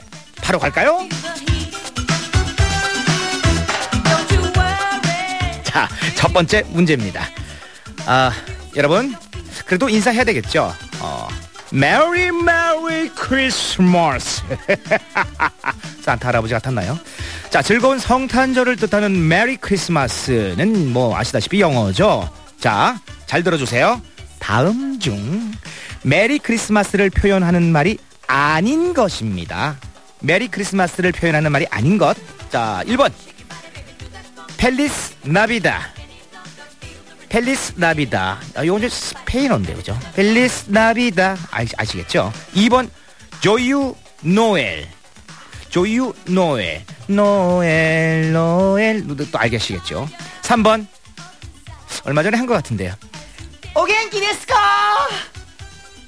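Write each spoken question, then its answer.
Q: 다음 중 메리 크리스마스를 표현하는 말이 아닌 것입니다.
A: 3: 오겐키 데스카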